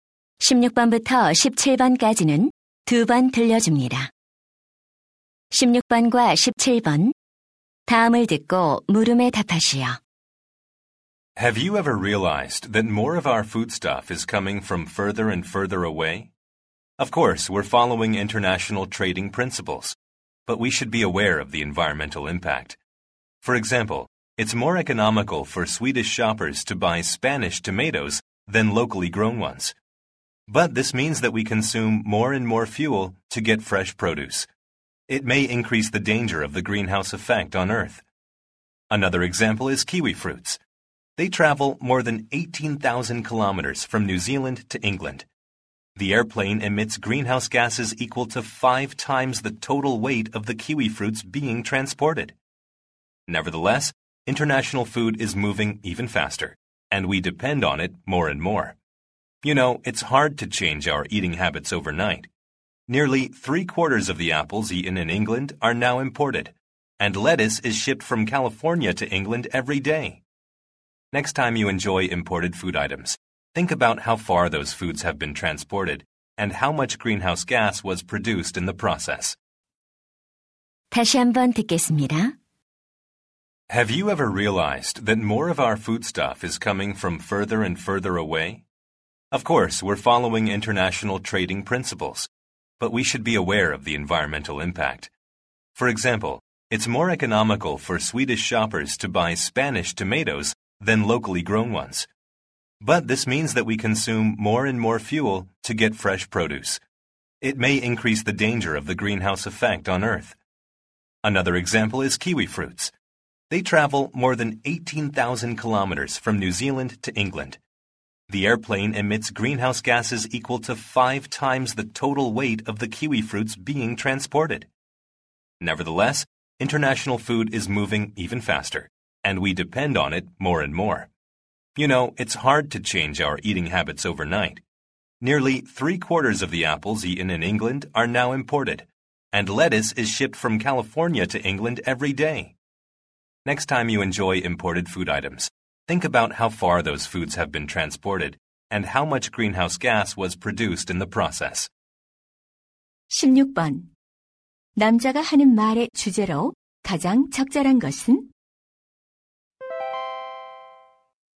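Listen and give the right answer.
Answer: 장거리 식품 운송이 환경에 미치는 영향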